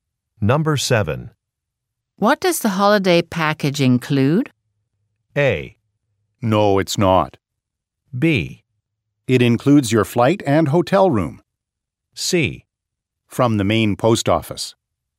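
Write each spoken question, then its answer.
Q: What does the holiday package include?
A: B: It includes your flight and hotel room.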